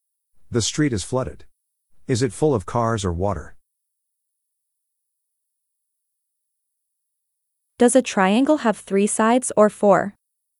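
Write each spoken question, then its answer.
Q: Is it full of cars or water?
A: Water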